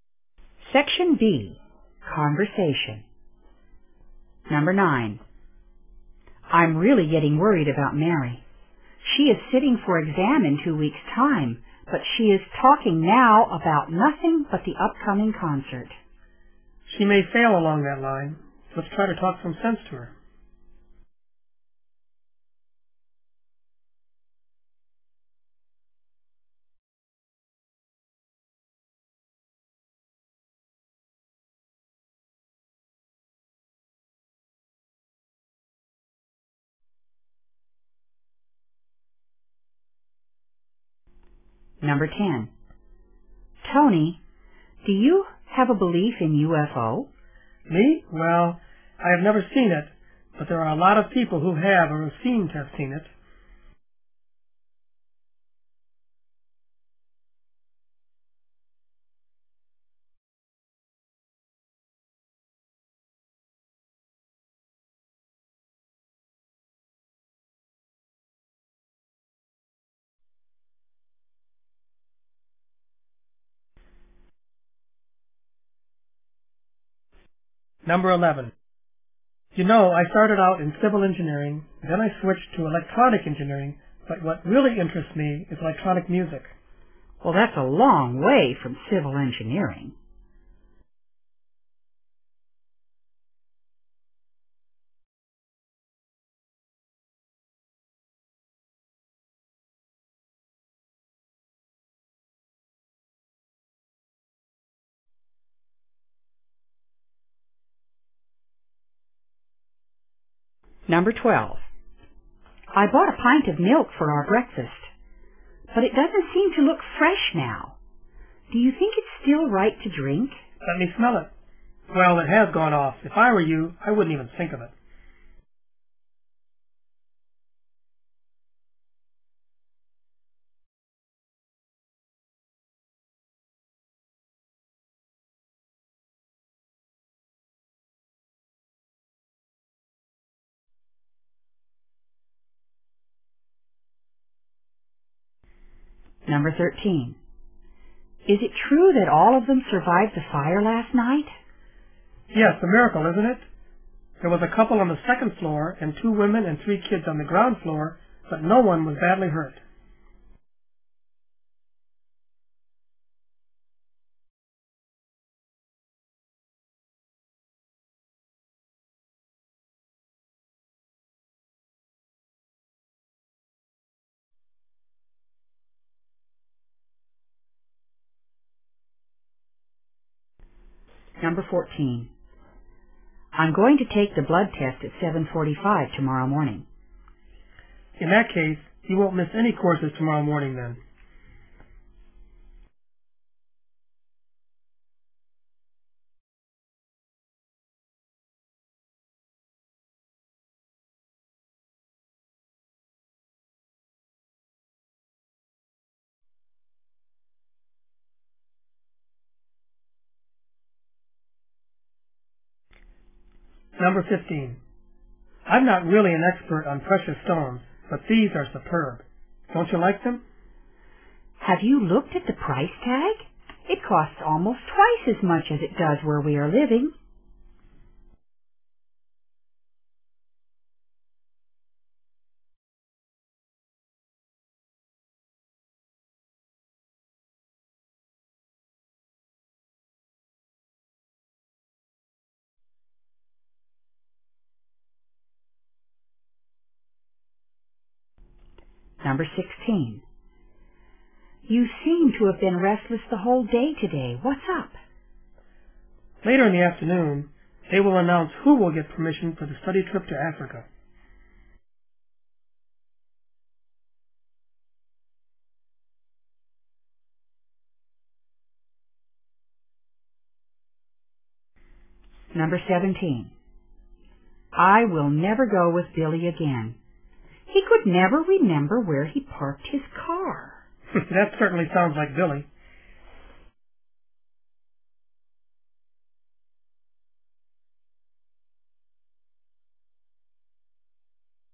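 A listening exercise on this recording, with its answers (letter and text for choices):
In this Section, you will hear short conversations between two speakers. At the end of each conversation you will be given 10 seconds to answer the question.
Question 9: What are the speakers probably going to do?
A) To persuade Mary to spend more time on her lessons.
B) To help Mary to prepare for the upcoming concert.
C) To talk with Mary about going to the concert.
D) To ask Mary to stop worrying about the exam.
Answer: A) To persuade Mary to spend more time on her lessons.

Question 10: What can we learn about the man?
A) He firmly believes in UFOs.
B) He is doubtful about UFOs.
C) He is sure many people have seen UFOs.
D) He thinks many people have lied about UFOs.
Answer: B) He is doubtful about UFOs.

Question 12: What does the man mean?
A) The milk is safe to drink.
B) The milk is not safe to drink.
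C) She shouldn't have bought the milk.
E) He wouldn't have milk for breakfast.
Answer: B) The milk is not safe to drink.

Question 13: How many people were caught in the fire?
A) 6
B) 5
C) 4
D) 7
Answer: D) 7

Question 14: What can we learn from the conversation?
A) The woman will attend her course at 7:45.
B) The woman will be late for the blood test.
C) The woman will have her blood tested before the first class.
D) The woman decides to miss the first class for her blood test.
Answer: C) The woman will have her blood tested before the first class.

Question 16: How does the man probably feel?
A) Nervous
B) Uninterested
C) Confident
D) Upset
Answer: A) Nervous

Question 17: What do we know about Bill?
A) He is thoughtful.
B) He is forgetful.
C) He is careless.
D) He is helpful.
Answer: B) He is forgetful.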